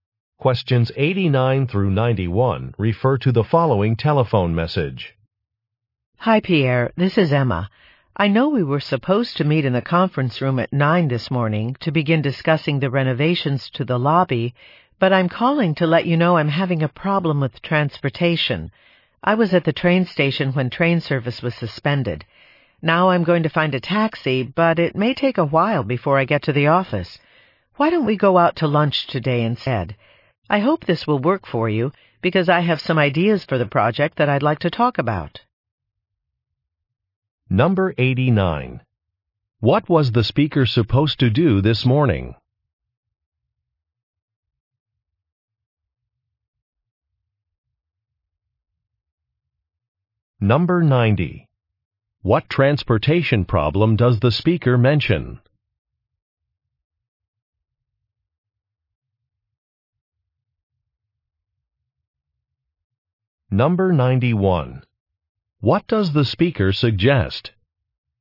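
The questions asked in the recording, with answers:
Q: What was the speaker supposed to do this morning?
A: Meet Pierre to discuss the lobby renovations

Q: What transportation problem does the speaker mention?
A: Train service was suspended

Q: What does the speaker suggest?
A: Going out to lunch instead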